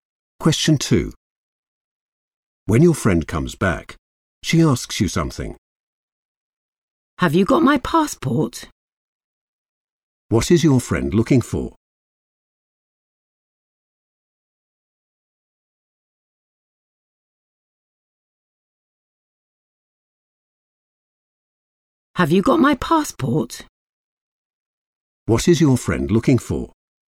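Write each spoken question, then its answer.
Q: What is your friend looking for?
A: her passport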